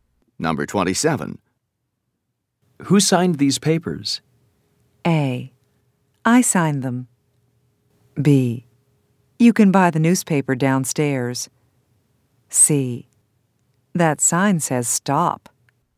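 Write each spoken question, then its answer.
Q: Who signed these papers?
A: A: I signed them.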